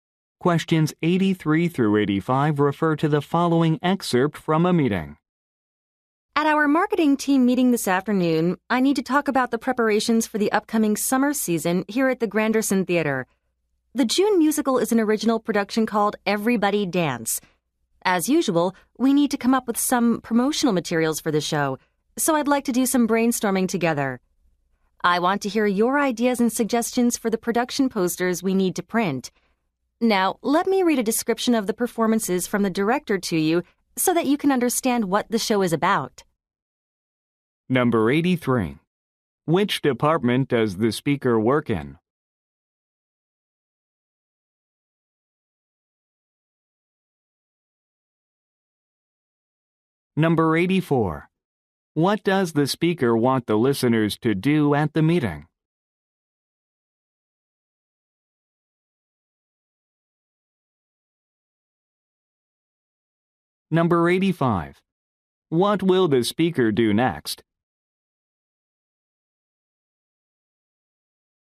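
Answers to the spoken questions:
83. Marketing
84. Brainstorm ideas for the production posters
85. Read the director's description of the performances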